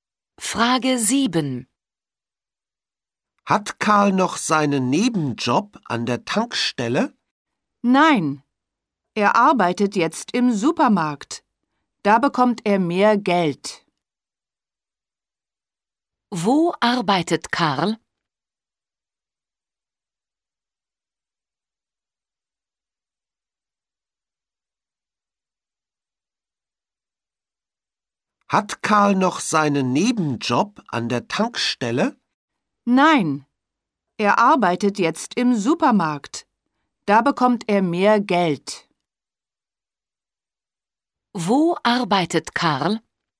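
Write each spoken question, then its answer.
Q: Wo arbeitet Karl?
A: Im Supermarkt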